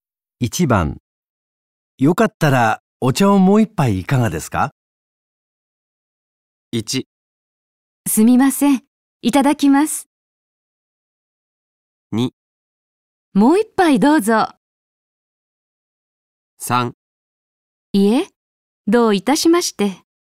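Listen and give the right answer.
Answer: 1: すみません。いただきます。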